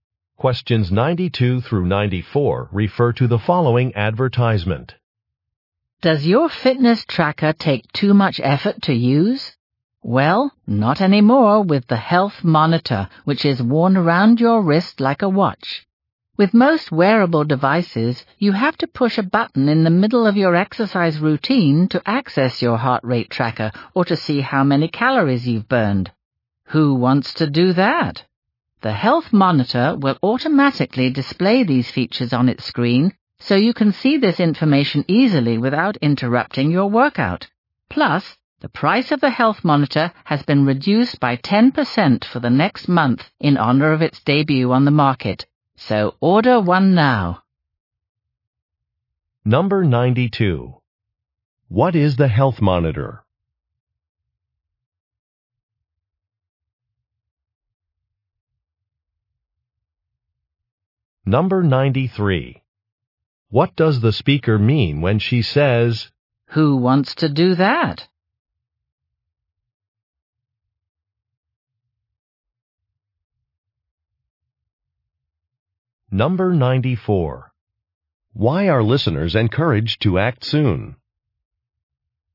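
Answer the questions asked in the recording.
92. A wearable fitness tracker
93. Pushing buttons during exercise is inconvenient
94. The price is reduced by 10% for the next month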